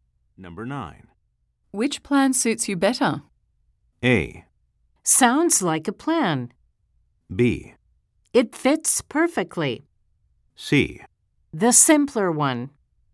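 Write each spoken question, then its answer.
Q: Which plan suits you better?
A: C: The simpler one.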